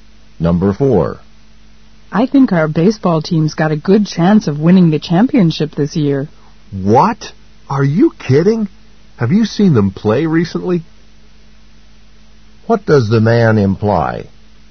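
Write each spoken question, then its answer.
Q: What does the man imply?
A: The team has been playing badly and isn't likely to win.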